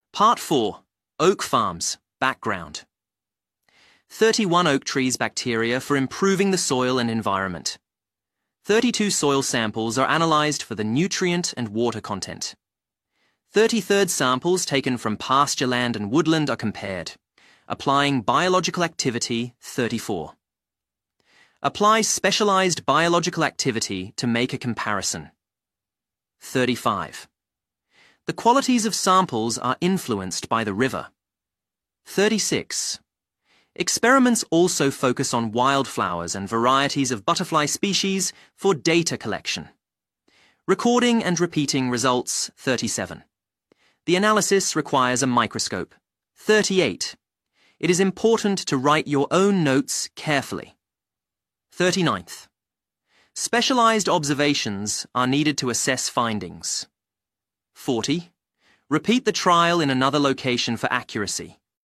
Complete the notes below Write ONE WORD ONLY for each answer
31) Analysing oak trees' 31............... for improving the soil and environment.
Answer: Batteria

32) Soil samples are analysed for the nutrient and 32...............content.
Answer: Water

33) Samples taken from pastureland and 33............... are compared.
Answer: Woodland

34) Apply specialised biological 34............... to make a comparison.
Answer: Activity

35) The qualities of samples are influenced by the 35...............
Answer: River

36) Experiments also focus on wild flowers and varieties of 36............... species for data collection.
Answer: Butterfly

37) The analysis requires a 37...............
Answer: Microscope

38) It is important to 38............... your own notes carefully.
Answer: Write

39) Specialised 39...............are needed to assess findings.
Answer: Observations

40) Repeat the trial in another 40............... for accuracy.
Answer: Location